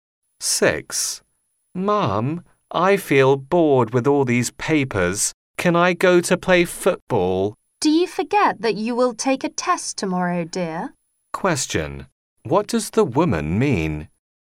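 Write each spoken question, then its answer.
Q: What does the woman mean?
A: He should study for tomorrow's test instead of playing football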